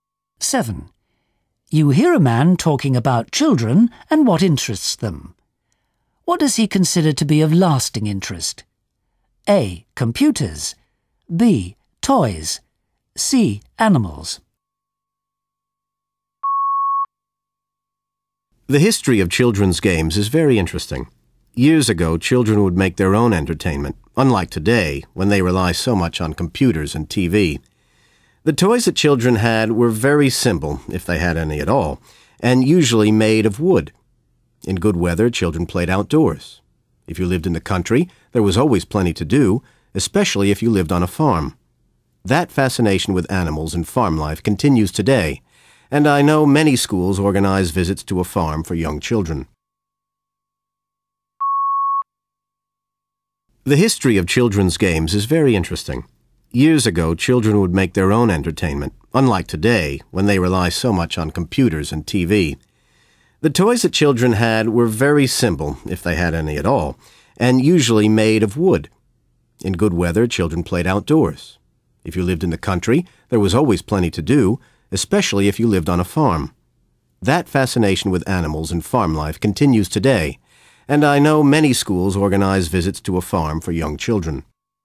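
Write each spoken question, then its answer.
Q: What does he consider to be of lasting interest?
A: C: Animals.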